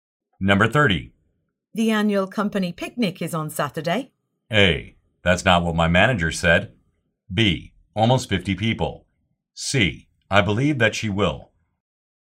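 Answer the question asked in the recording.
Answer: A: That's not what my manager said.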